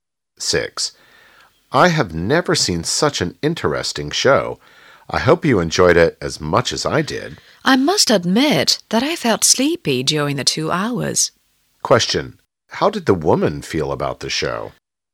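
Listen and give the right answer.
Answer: She found it boring.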